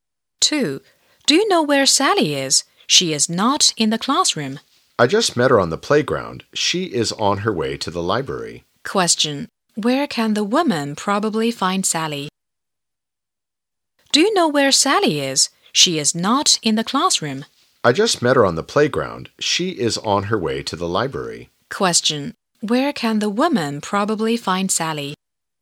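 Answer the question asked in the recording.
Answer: In the library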